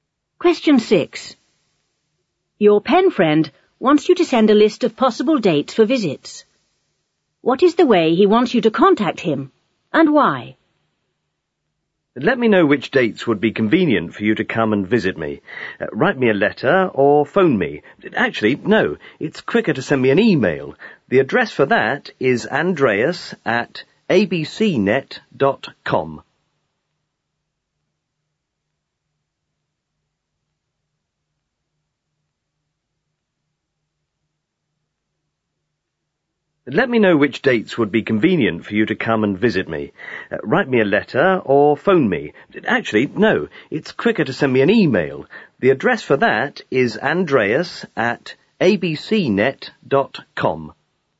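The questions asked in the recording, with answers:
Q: What is the way he wants you to contact him?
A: By email

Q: And why?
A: Because it's quicker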